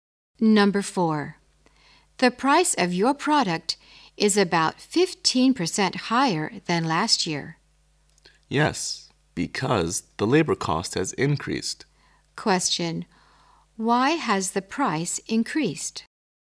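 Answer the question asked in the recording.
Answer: The labor cost has increased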